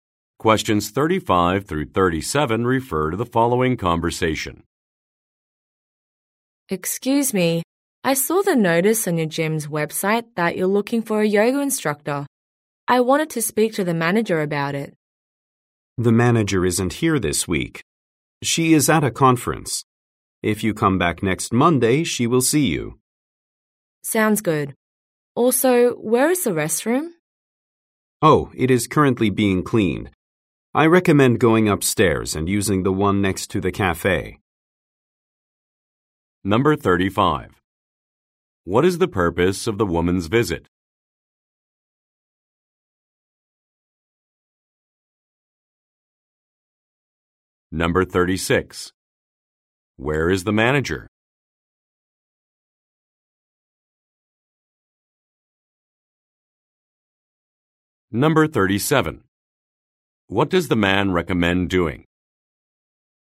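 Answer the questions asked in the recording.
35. To ask about the yoga instructor job
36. At a conference
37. Using the restroom upstairs next to the cafe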